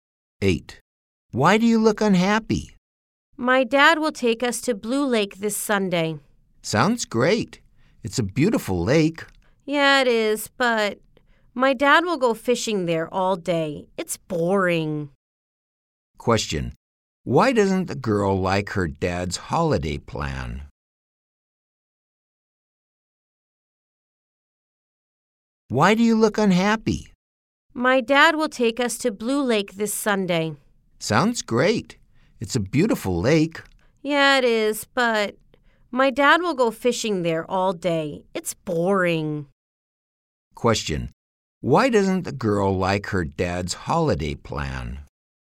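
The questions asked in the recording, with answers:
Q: Why doesn't the girl like her dad's holiday plan?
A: Her dad will go fishing all day, which is boring.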